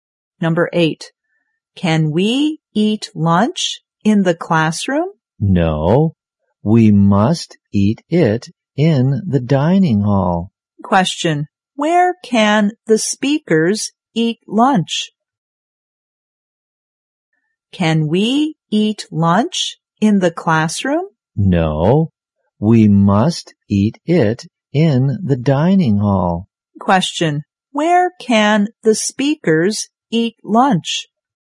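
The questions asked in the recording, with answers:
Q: where can the speakers eat lunch?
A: In the dining hall.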